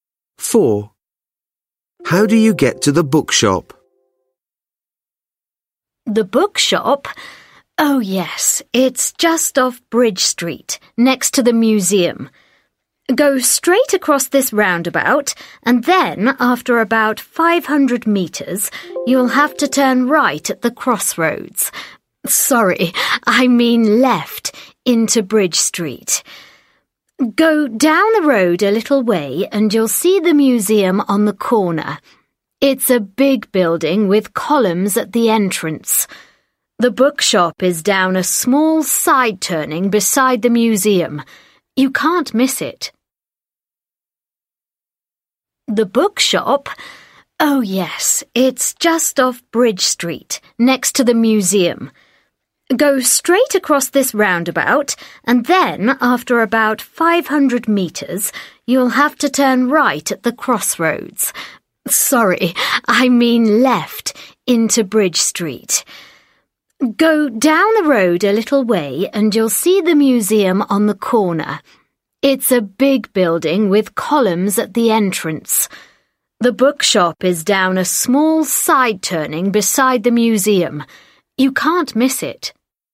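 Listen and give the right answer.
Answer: Go across the roundabout, turn left at the crossroads into Bridge Street; it's beside the museum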